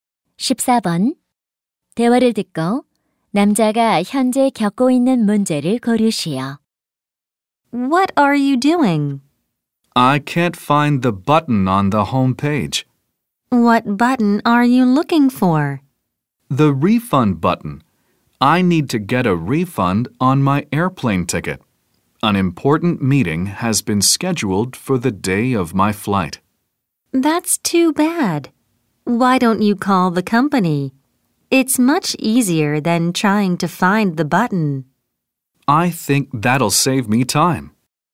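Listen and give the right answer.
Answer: 홈페이지에서 환불 버튼을 찾지 못함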